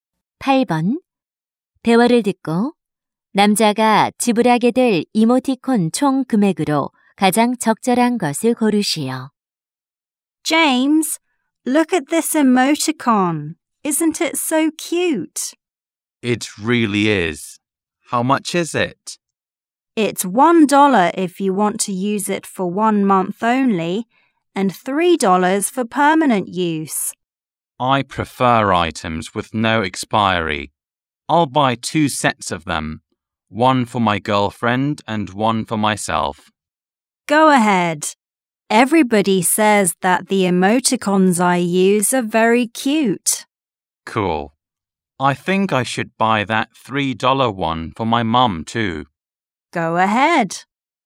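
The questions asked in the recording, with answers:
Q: 대화를 듣고 남자가 지불하게 될 이모티콘 총 금액으로 가장 적절한 것을 고르시오.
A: 9달러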